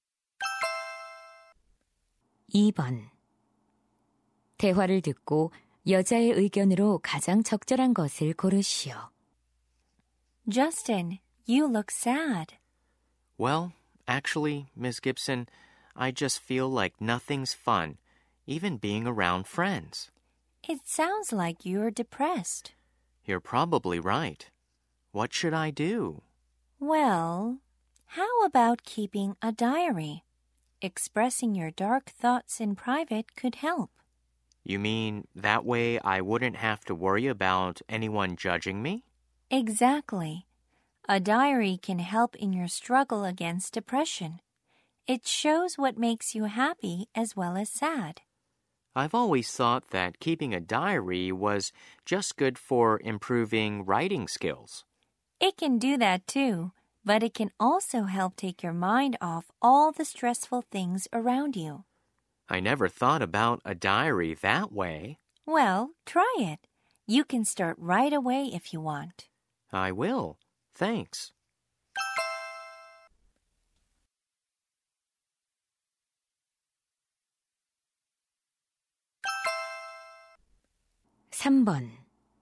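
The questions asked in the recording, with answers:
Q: 대화를 듣고 여자의 의견으로 가장 적절한 것을 고르시오.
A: 일기 쓰기는 우울감 극복에 도움이 된다.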